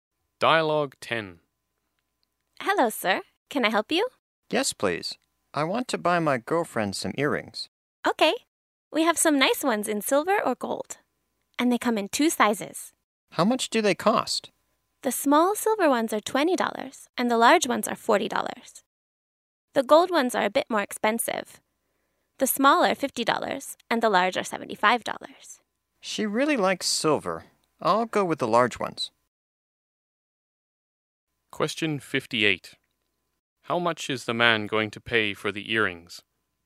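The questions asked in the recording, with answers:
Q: How much is the man going to pay for the earrings?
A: $40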